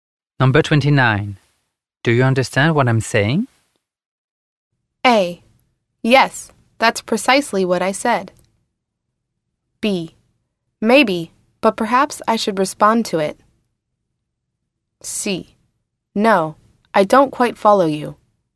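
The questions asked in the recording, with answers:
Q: Do you understand what I'm saying?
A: C: No, I don't quite follow you.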